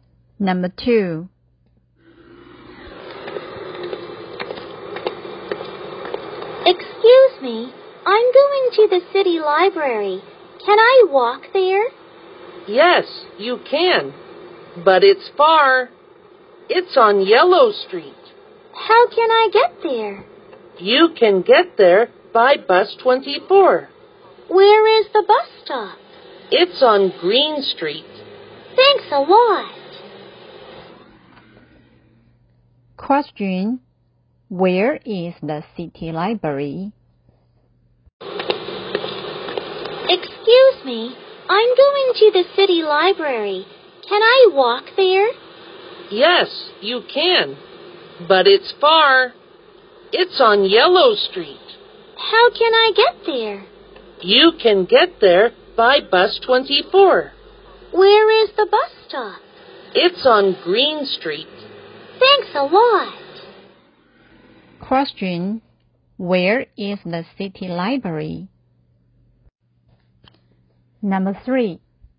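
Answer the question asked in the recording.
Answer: On Yellow Street.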